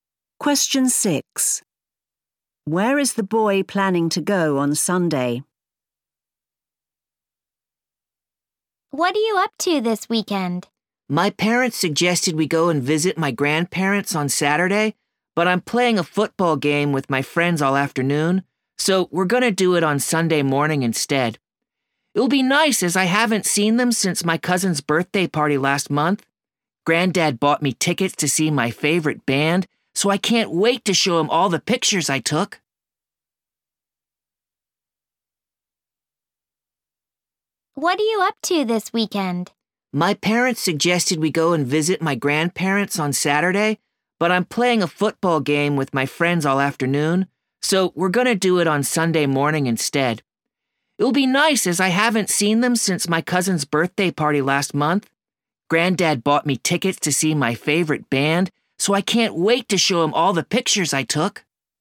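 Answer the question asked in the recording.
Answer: To visit his grandparents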